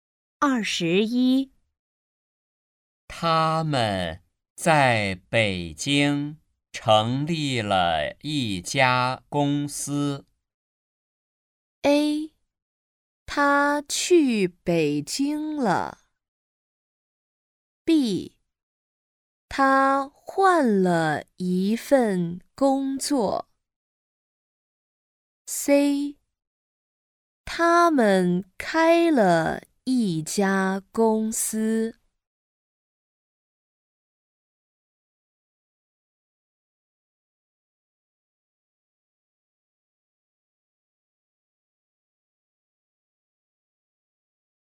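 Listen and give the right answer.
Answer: C: 他们开了一家公司。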